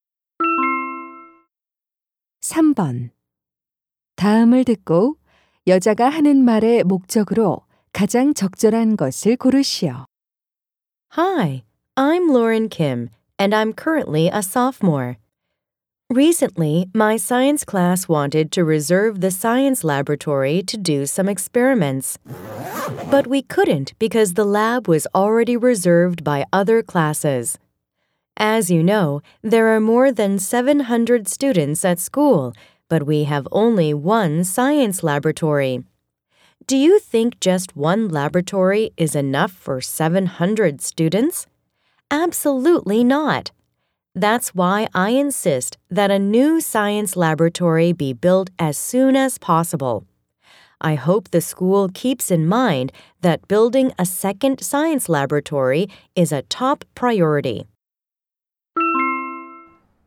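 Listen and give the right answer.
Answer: 새 과학 실험실 건설을 요구하려고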